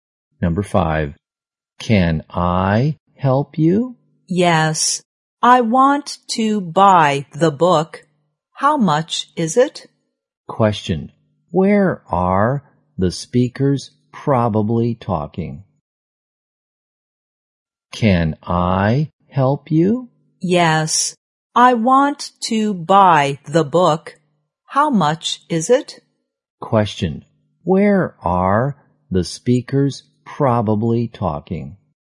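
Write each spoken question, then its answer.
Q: Where are the speakers probably talking?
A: In a bookstore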